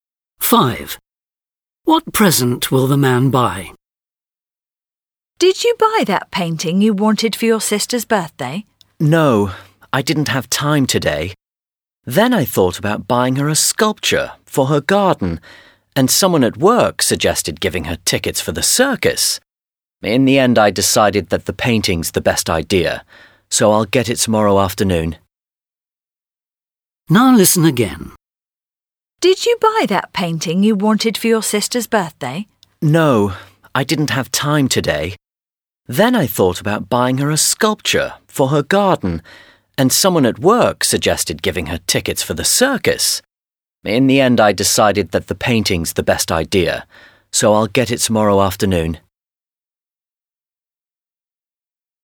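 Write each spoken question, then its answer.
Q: What present will the man buy?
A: A painting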